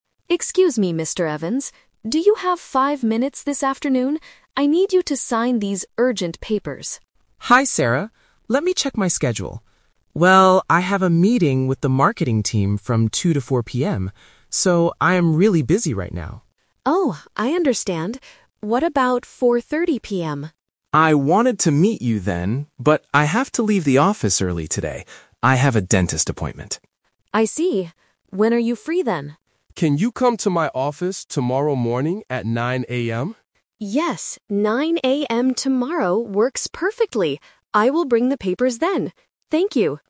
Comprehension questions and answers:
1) When will Sarah and Mr. Evans meet?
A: Tomorrow at 9:00 AM

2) Why is Mr. Evans busy from 2:00 to 4:00 PM?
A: He has a team meeting.

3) Why must Mr. Evans leave the office early today?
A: He has a doctor's appointment.